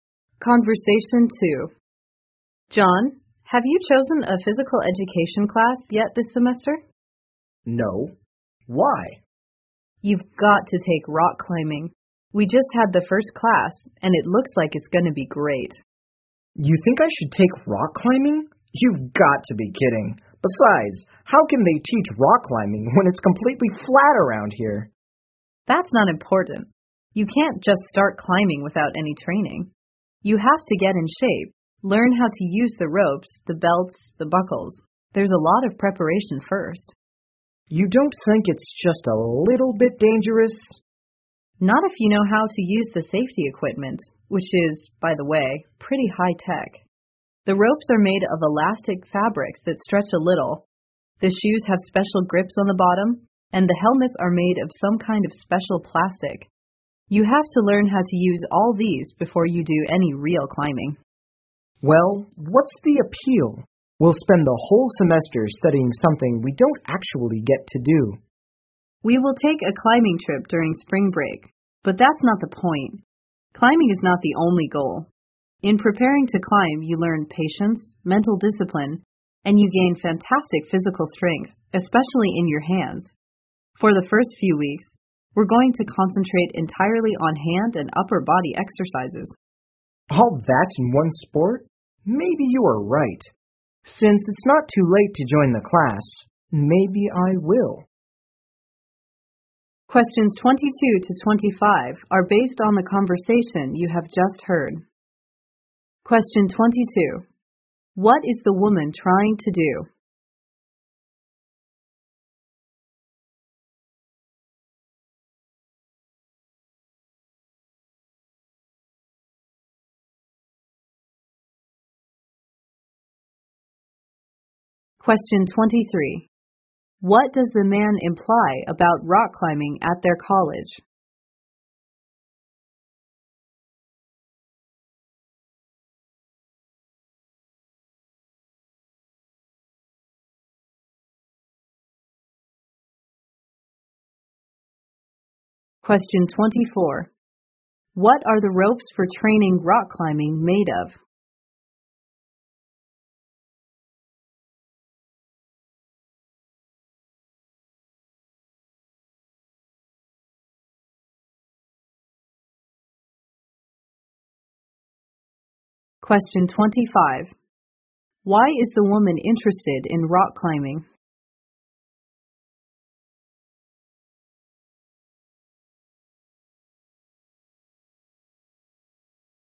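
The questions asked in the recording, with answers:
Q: What is the woman trying to do?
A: Persuade John to take the rock climbing class

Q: What does the man imply about rock climbing at their college?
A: It seems impossible because the area is completely flat

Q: What are the ropes for training rock climbing made of?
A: Elastic fabrics that stretch a little

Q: Why is the woman interested in rock climbing?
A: It builds patience, mental discipline and physical strength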